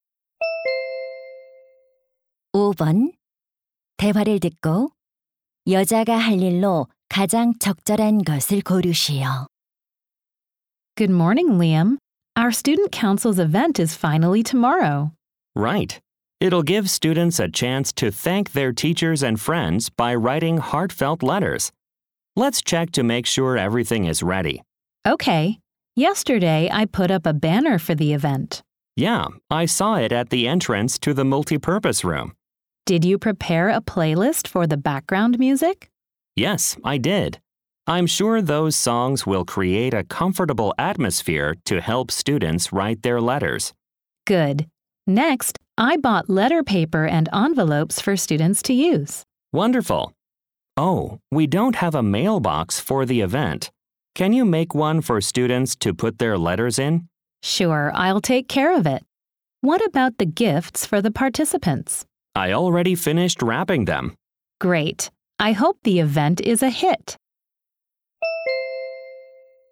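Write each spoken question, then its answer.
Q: 대화를 듣고 여자가 할 일로 가장 적절한 것을 고르시오.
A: 우체통(편지함) 만들기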